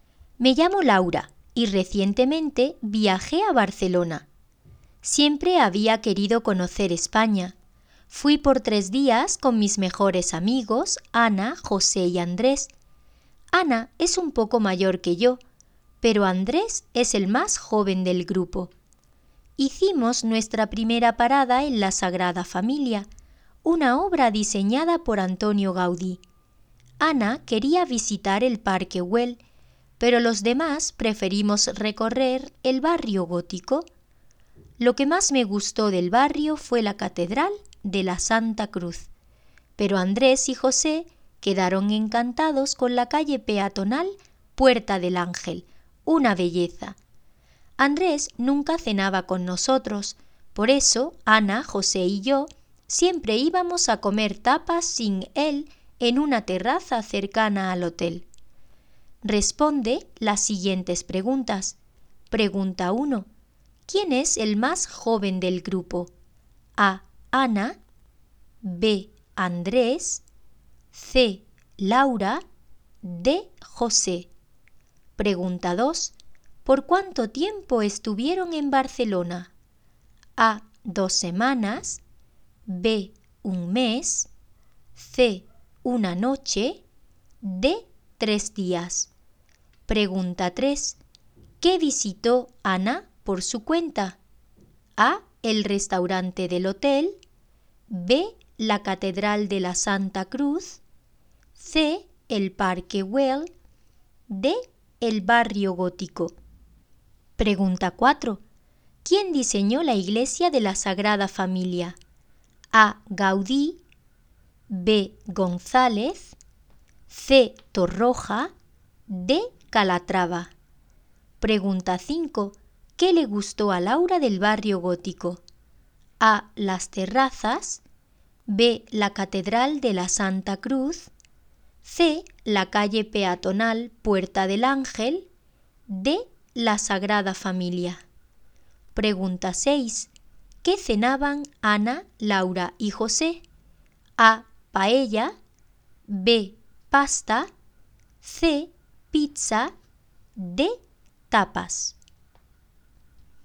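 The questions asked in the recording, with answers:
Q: ¿Quién es el más joven del grupo?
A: B: Andrés

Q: ¿Por cuánto tiempo estuvieron en Barcelona?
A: D: 3 días

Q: ¿Quién diseñó la iglesia de la Sagrada Familia?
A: A: Gaudí

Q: ¿Qué le gustó a Laura del Barrio Gótico?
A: B: La Catedral de la Santa Cruz

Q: ¿Qué cenaban Ana, Laura y José?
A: D: Tapas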